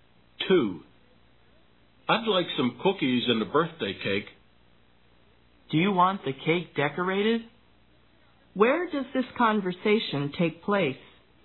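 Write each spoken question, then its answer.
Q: Where does this conversation take place?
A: At a bakery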